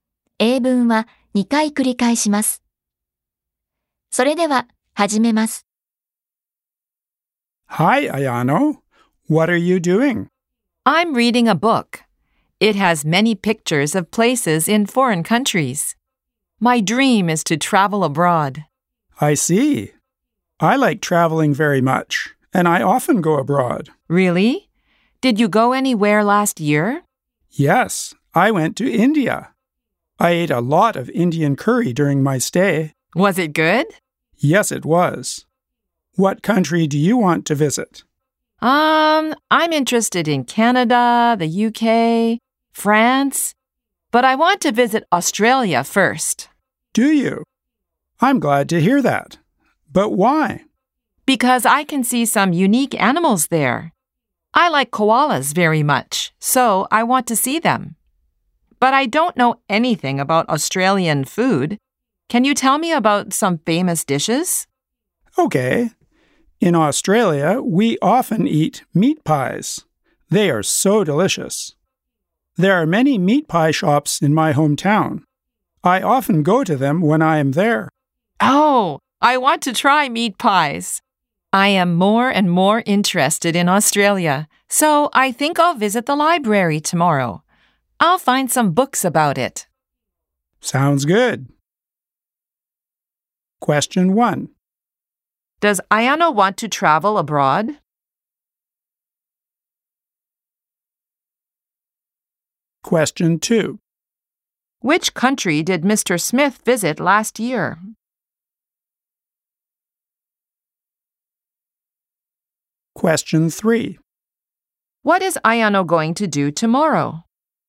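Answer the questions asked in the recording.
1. Yes, she does.
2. India
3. She is going to visit the library to find books about Australia.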